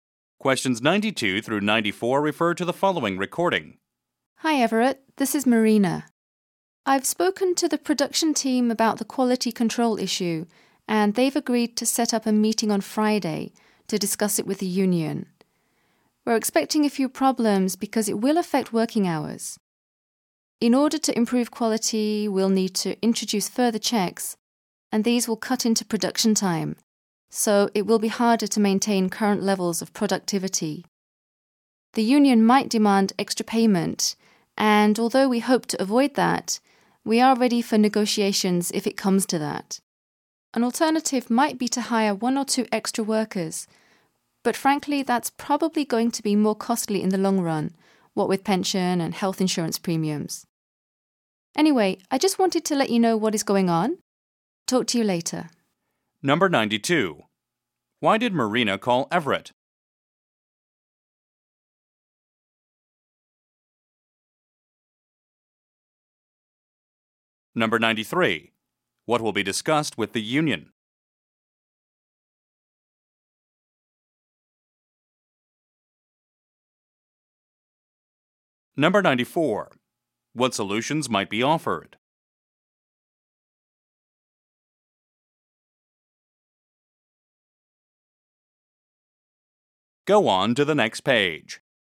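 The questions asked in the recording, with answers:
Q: Why did Marina call Everett?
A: To update him on the quality control issue

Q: What will be discussed with the union?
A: The quality control issue and its effect on working hours

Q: What solutions might be offered?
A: Extra payment or hiring extra workers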